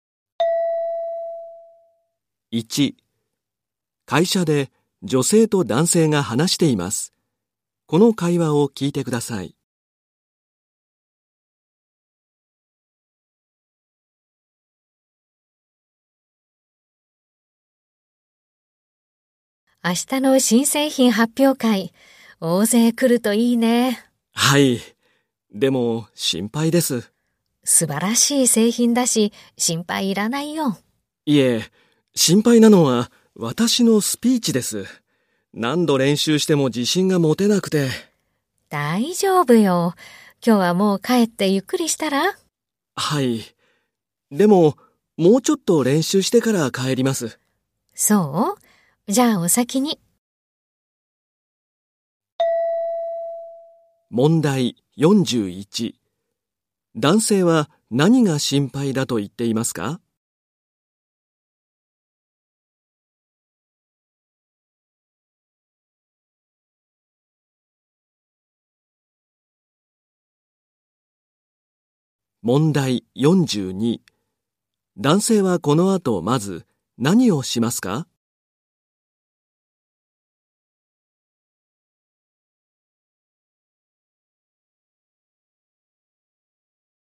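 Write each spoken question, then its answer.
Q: 男性は何が心配だと言っていますか?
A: 自分のスピーチ

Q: 男性はこの後まず何をしますか?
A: スピーチの練習をする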